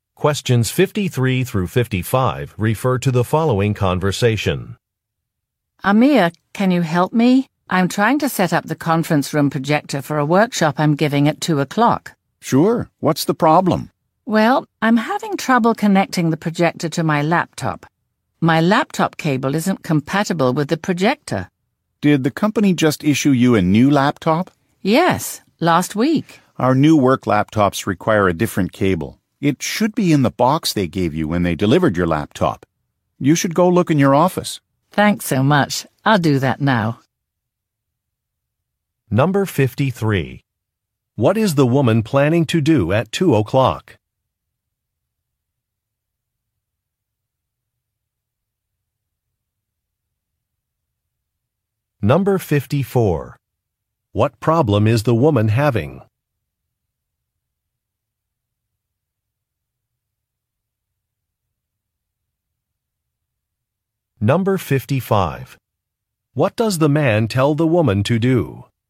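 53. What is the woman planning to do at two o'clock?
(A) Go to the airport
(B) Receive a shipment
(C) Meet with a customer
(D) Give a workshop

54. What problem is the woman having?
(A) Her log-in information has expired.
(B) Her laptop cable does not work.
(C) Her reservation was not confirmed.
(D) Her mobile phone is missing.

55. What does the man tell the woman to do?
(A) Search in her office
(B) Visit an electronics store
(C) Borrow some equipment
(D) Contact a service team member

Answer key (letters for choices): 53D, 54B, 55A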